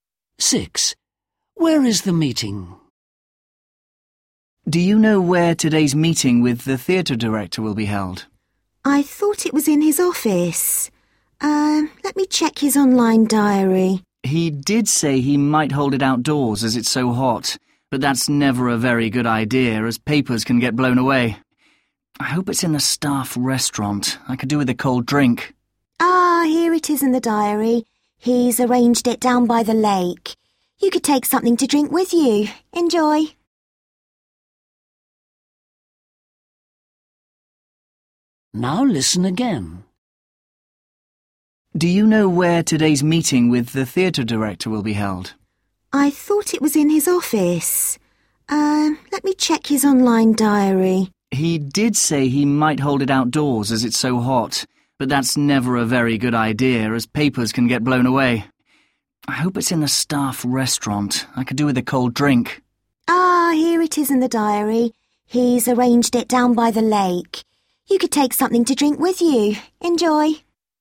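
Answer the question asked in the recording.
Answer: down by the lake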